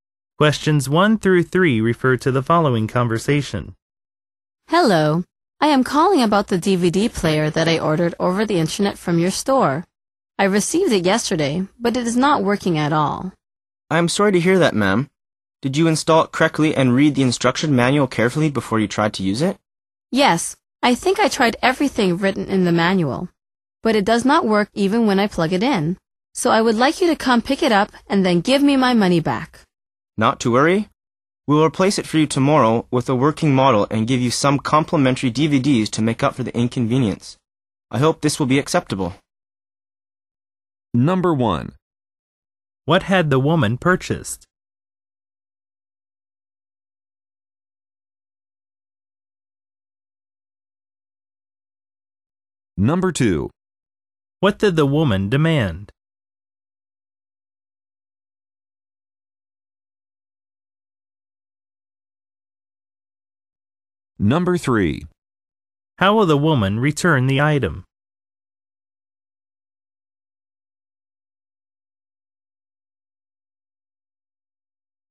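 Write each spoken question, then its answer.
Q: What had the woman purchased?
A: A DVD player

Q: What did the woman demand?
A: That the store pick it up and give her money back (a refund)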